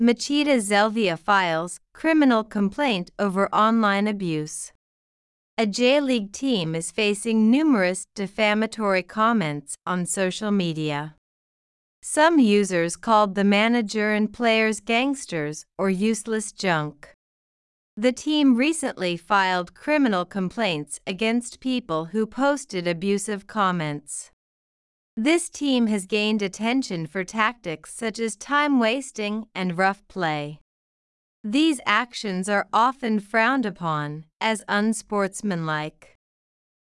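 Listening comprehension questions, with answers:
英語ニュースの音声を聞き、各空欄に入る英文を正確に書き取ってください。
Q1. A J-League team is facing ( ).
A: numerous defamatory comments on social media

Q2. ( ) "gangsters" or "useless junk."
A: Some users called the manager and players

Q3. The team recently filed criminal complaints ( ).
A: against people who posted abusive comments

次の各質問の答えを探しながら聞きましょう。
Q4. Who filed criminal complaints?(誰が刑事告訴をしましたか?)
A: Machida Zelvia, a J-League team

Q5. What did some users call the manager and players?(一部のユーザーは監督や選手を何と呼びましたか?)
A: Gangsters or useless junk

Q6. How did the team gain attention?(そのチームはどのようにして注目を集めましたか?)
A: Through tactics such as time-wasting and rough play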